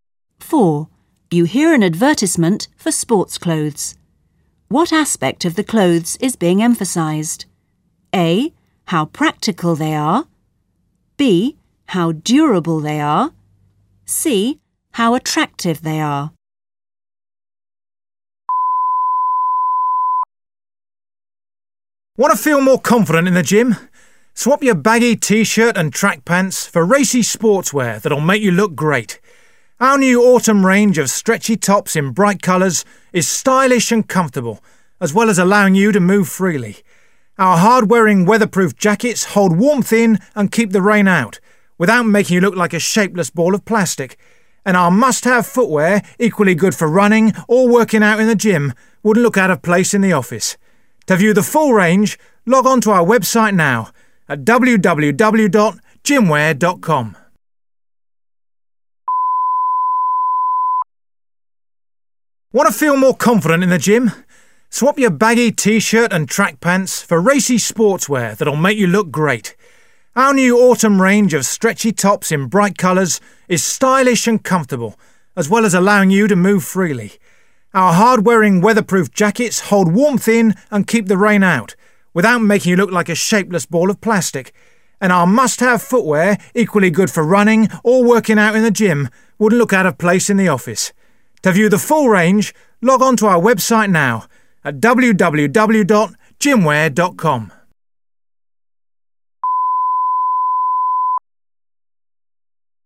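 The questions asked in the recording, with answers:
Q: What aspect of the clothes is being emphasised?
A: C: how attractive they are.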